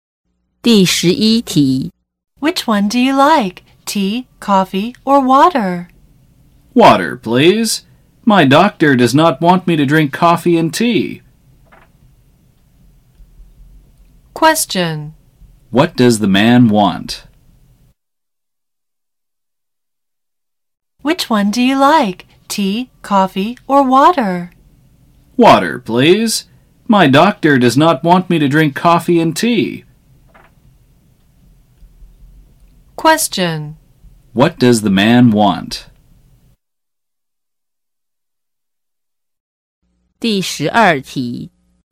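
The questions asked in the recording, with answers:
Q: What does the man want?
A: Water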